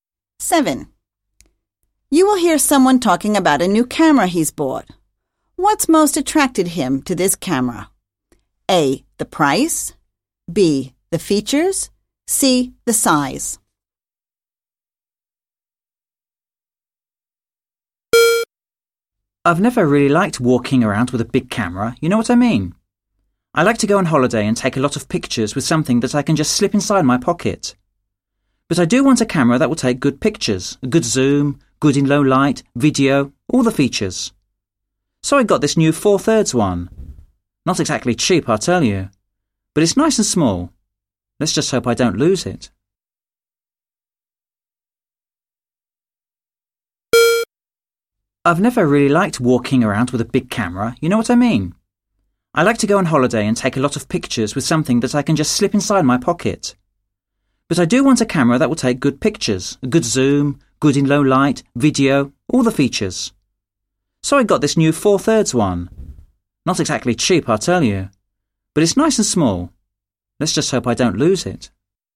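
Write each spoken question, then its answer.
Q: What's most attracted him to this camera?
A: C: The size.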